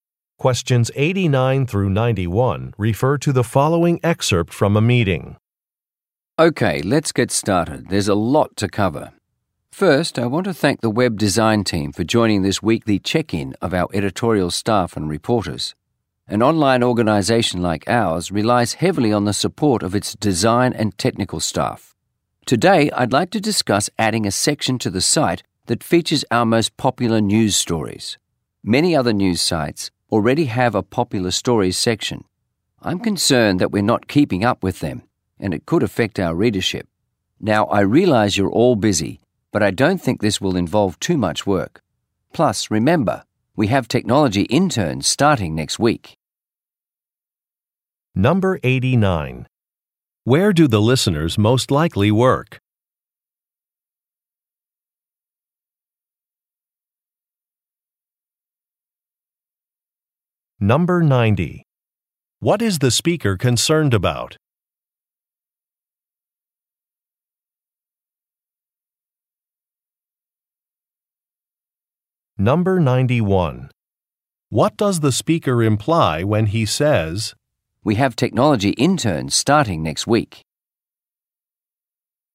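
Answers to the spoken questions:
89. At an online news organization
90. Falling behind competitors, which could affect readership
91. The interns can help with the extra work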